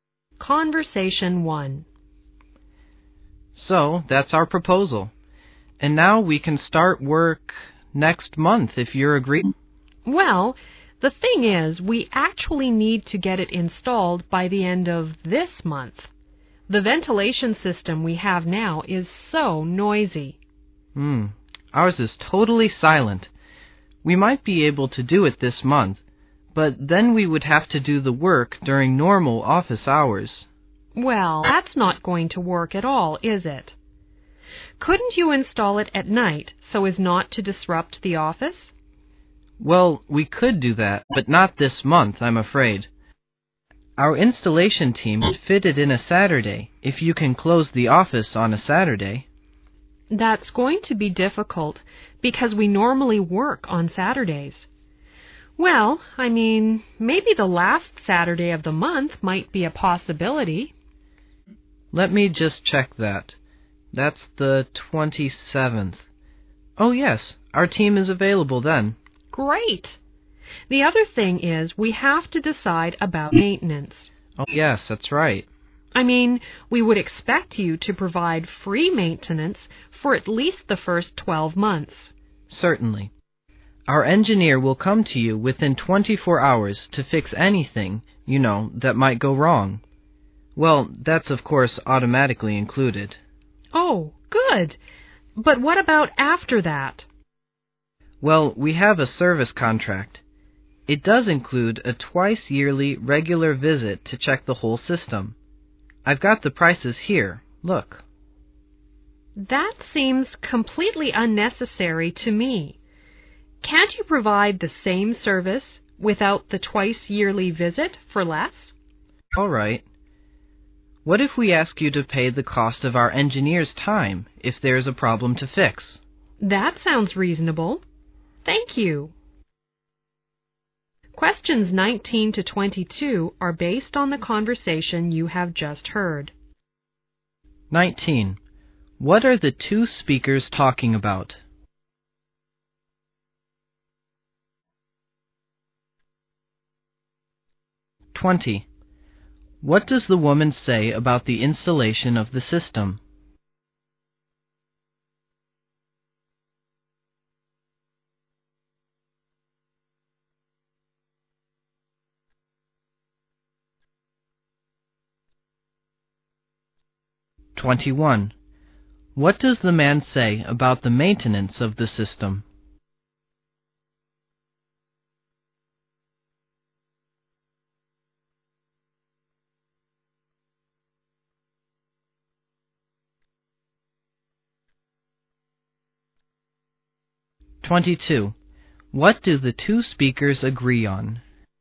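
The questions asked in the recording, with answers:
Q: What are the two speakers talking about?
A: Installing a new ventilation system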